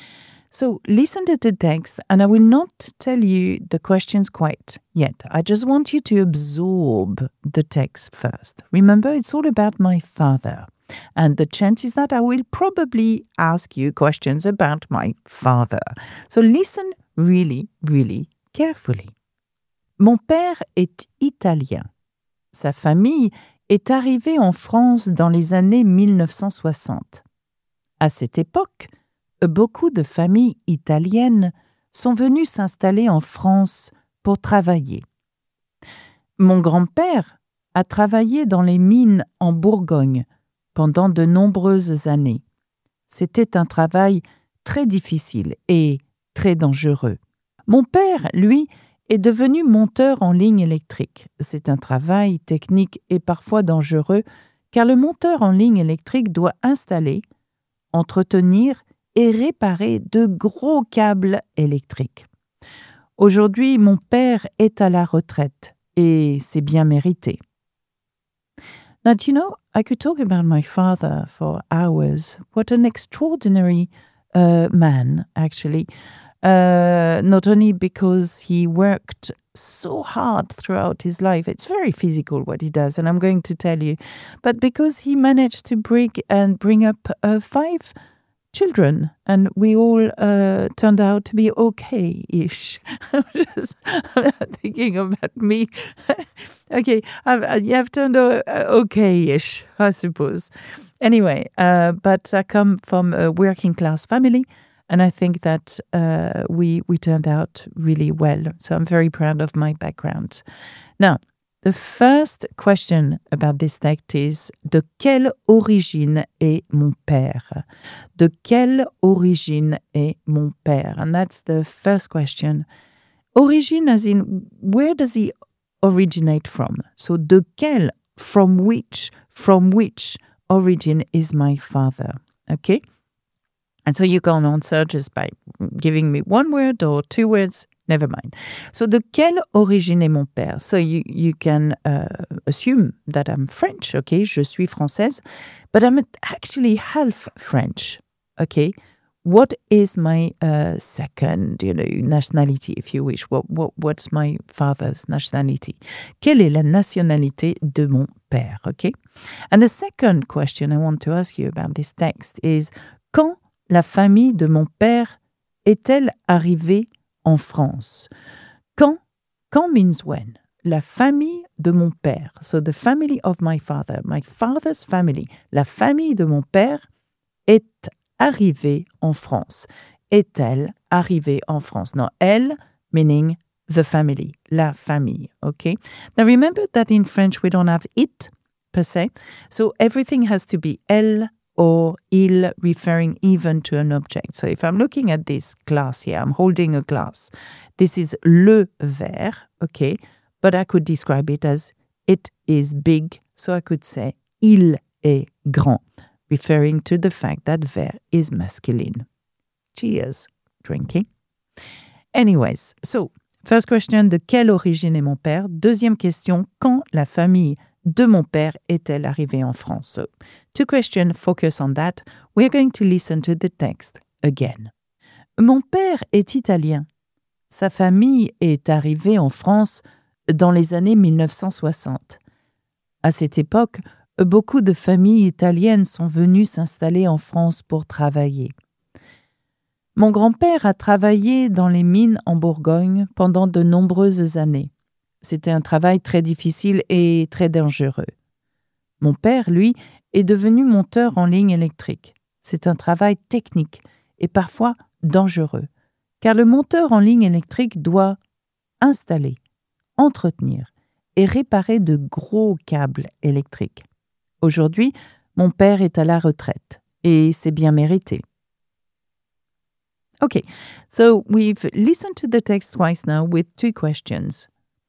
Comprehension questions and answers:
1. De quelle origine est mon père ?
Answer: Mon père est d'origine italienne. / Mon père est italien.

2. Quand la famille de mon père est-elle arrivée en France ?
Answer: La famille de mon père est arrivée en France dans les années 1960.

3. Où mon grand-père a-t-il travaillé ?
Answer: Mon grand-père a travaillé dans les mines en Bourgogne.